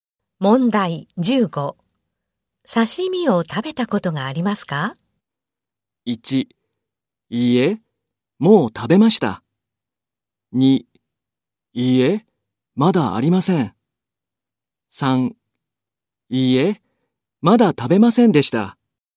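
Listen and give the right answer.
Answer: 2: いいえ、まだありません。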